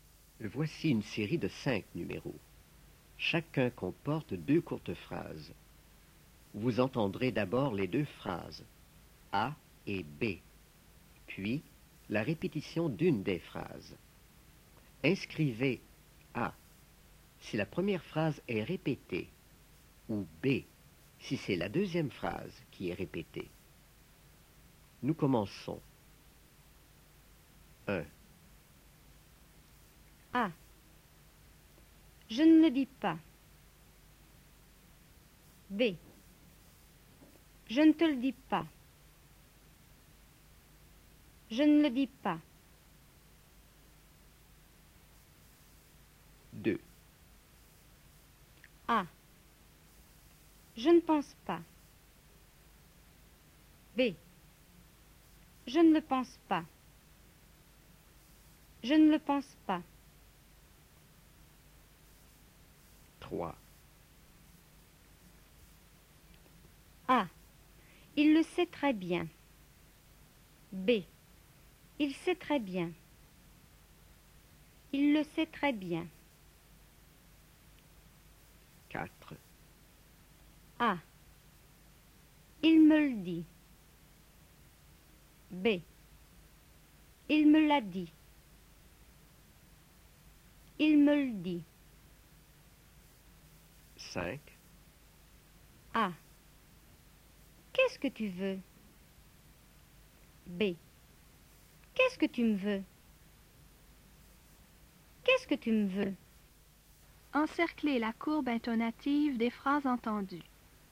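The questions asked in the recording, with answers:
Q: A. Je ne le dis pas. B. Je ne te le dis pas.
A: A: Je ne le dis pas.

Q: A. Je ne pense pas. B. Je ne le pense pas.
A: B: Je ne le pense pas.

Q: A. Il le sait très bien. B. Il sait très bien.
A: A: Il le sait très bien.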